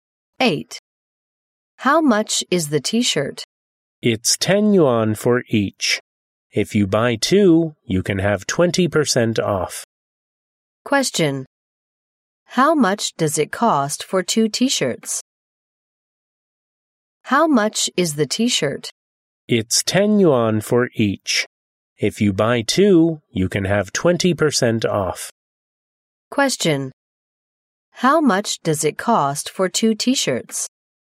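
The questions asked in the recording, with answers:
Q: How much does it cost for 2 t-shirts?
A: 16 yuan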